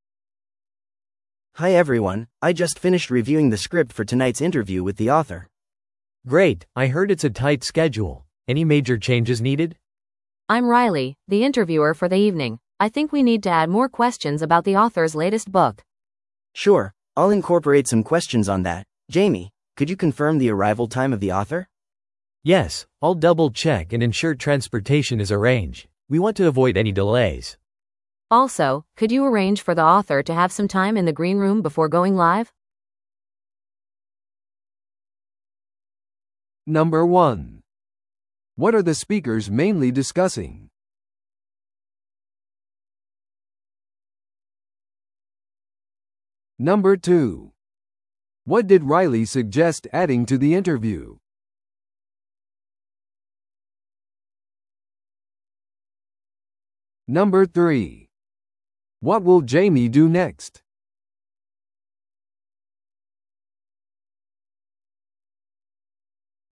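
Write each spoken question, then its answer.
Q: What are the speakers mainly discussing?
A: Preparations for tonight's interview with an author

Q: What did Riley suggest adding to the interview?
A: More questions about the author's latest book

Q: What will Jamie do next?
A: Confirm the author's arrival time and arrange transportation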